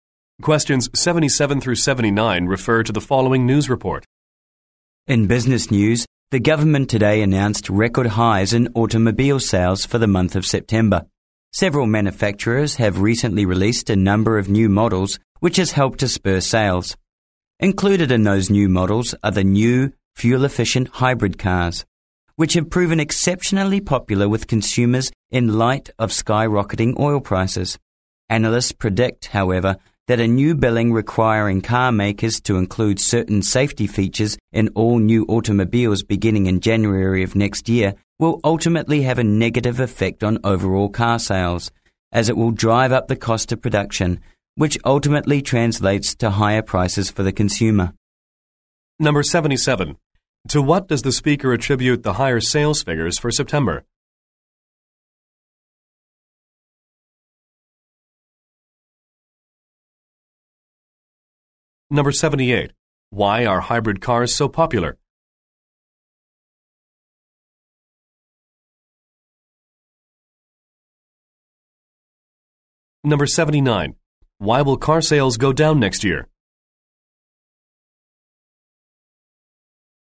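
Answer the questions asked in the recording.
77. The release of new models
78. They are fuel-efficient while oil prices are skyrocketing
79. A new bill requiring safety features will raise production costs and prices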